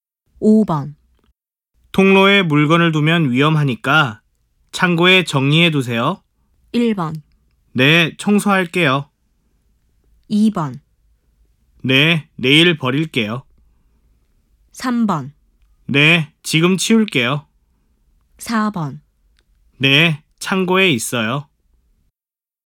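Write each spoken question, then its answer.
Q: 통로에 물건을 두면 위험하니까 창고에 정리해 두세요.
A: 3: 네, 지금 치울게요.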